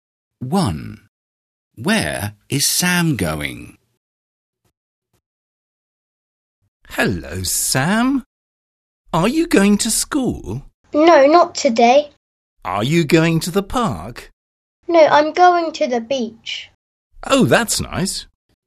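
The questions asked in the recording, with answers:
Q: Where is Sam going?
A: To the beach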